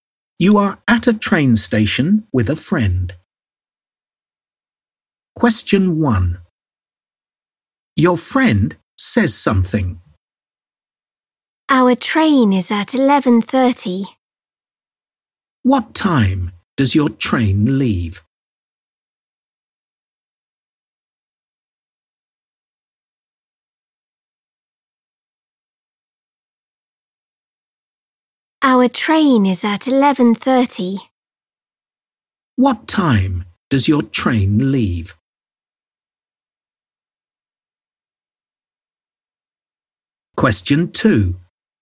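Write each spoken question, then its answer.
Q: What time does your train leave?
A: 11:30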